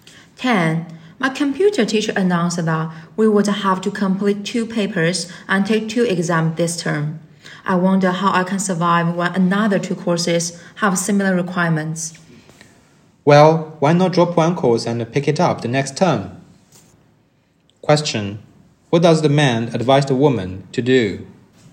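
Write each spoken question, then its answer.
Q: What does the man advise the woman to do?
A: Drop one course and take it next term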